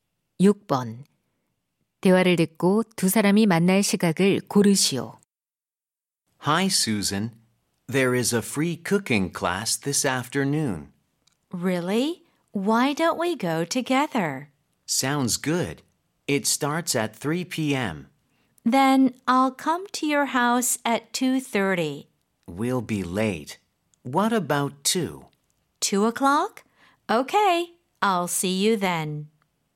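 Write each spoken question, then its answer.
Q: 대화를 듣고 두 사람이 만날 시각을 고르시오.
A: 2시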